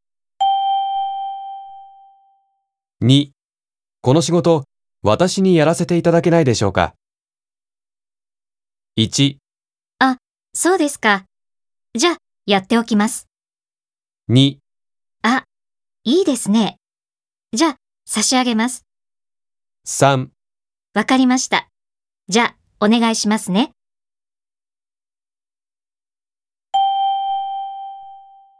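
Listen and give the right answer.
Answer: 3: わかりました。じゃあ、お願いしますね。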